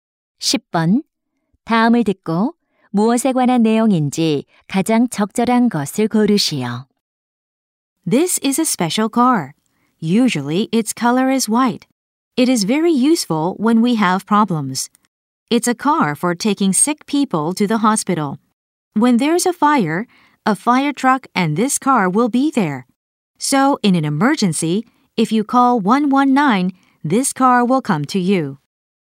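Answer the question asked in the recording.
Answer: 구급차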